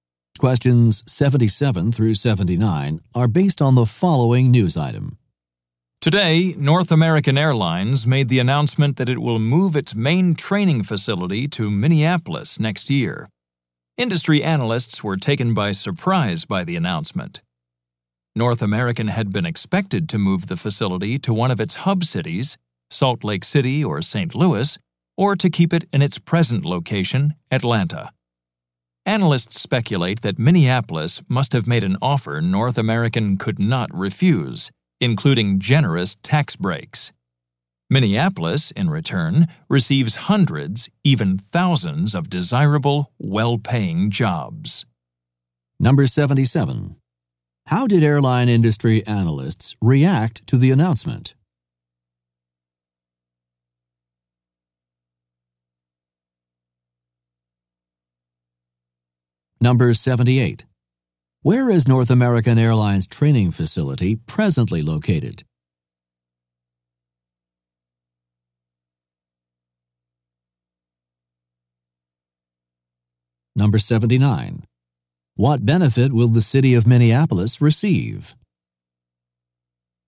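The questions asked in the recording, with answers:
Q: How did airline industry analysts react to the announcement?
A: They were surprised

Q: Where is North American Airlines training facility presently located?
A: Atlanta

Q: What benefit will the city of Minneapolis receive?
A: Hundreds or thousands of well-paying jobs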